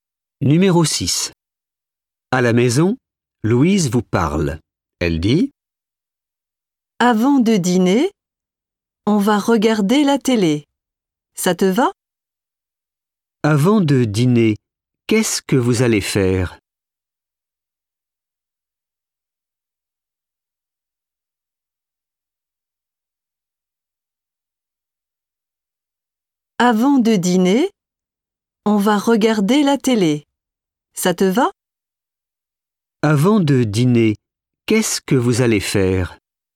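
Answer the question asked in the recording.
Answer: regarder la télé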